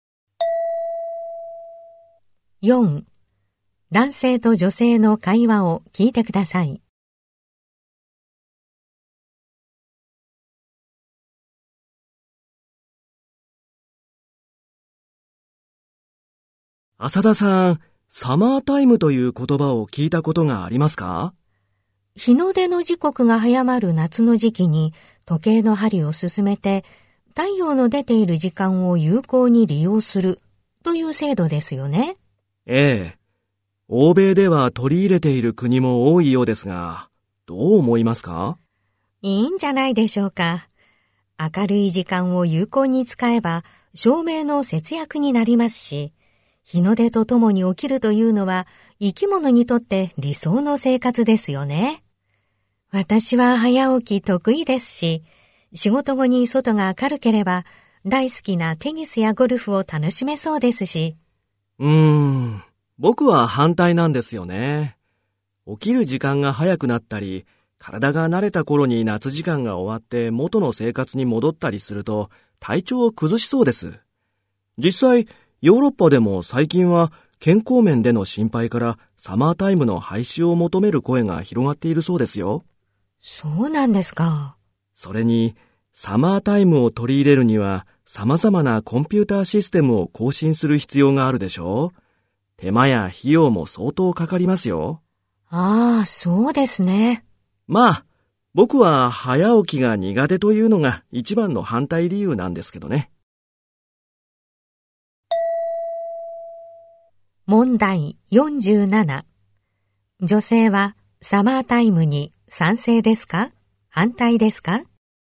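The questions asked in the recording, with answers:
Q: 女性はサマータイムに賛成ですか?反対ですか?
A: 賛成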